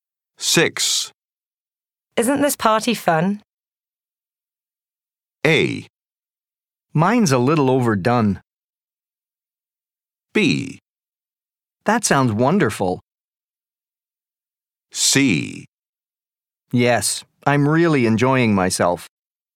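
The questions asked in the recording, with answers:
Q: Isn't this party fun?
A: C: Yes, I'm really enjoying myself.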